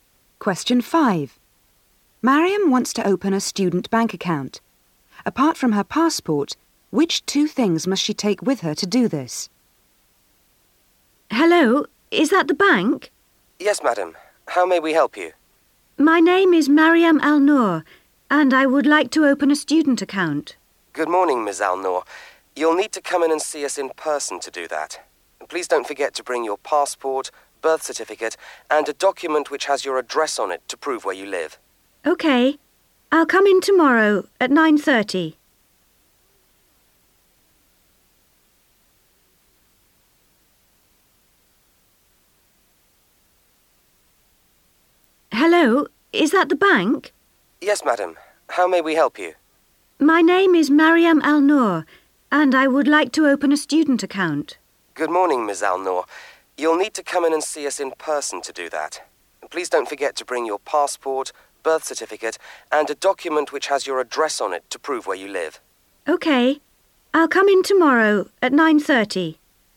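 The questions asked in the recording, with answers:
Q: Apart from her passport, which two things must she take with her to do this?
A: Her birth certificate and a document showing her address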